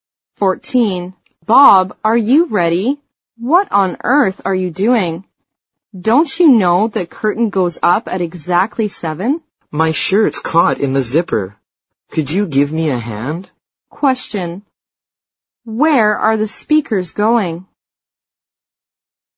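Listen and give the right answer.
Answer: To the theater (to see a play).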